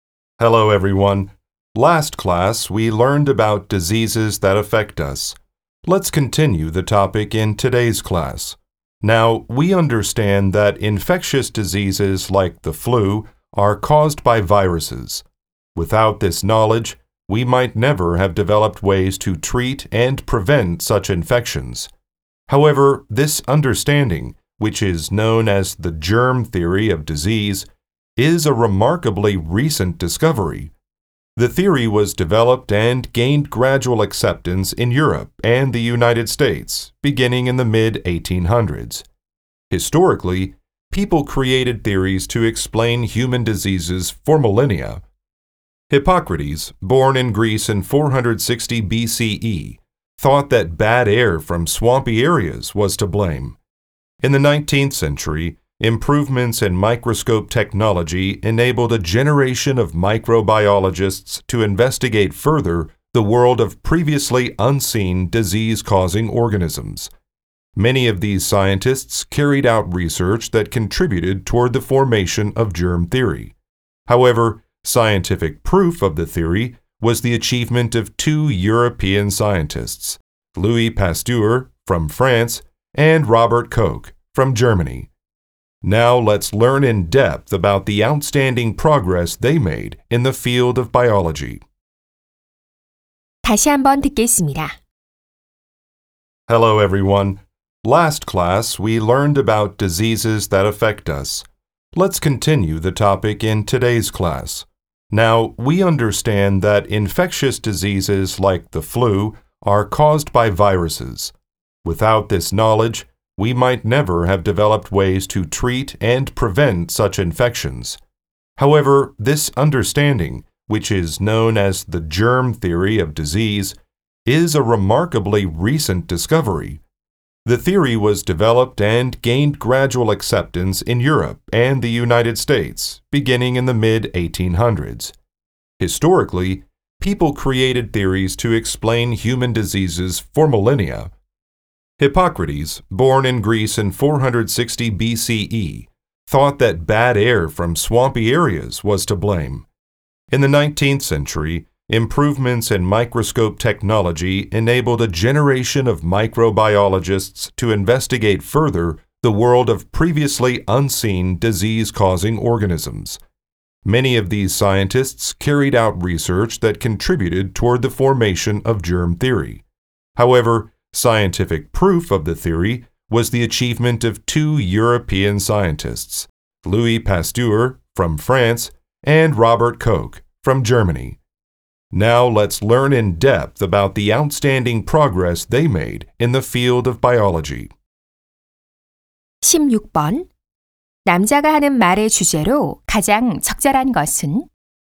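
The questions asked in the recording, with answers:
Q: 남자가 하는 말의 주제로 가장 적절한 것은?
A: 질병의 세균설이 발전해 온 역사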